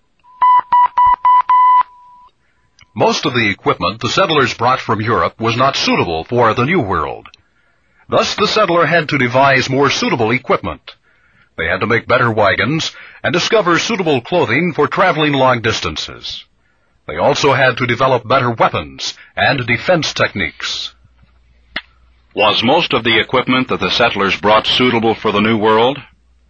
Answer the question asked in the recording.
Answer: No, most of it was not suitable.